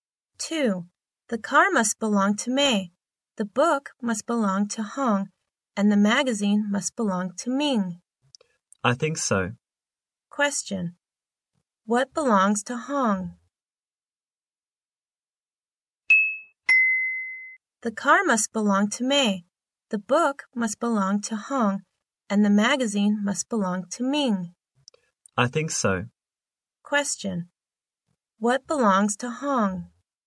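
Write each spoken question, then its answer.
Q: What belongs to Hong?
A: The book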